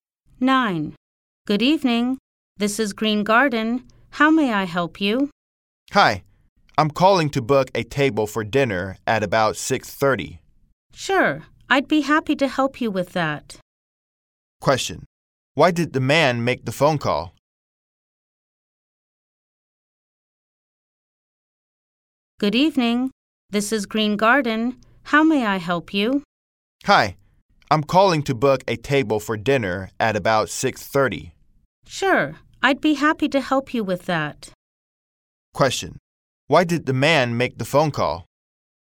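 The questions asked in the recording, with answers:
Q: Why did the man make the phone call?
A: To book a table for dinner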